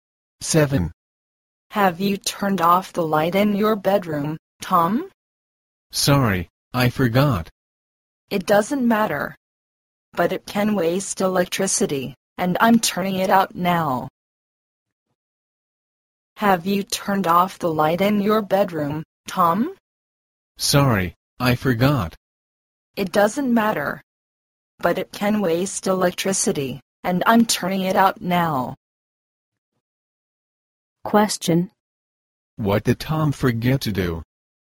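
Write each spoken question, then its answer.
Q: What did Tom forget to do?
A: Turn off the light in his bedroom.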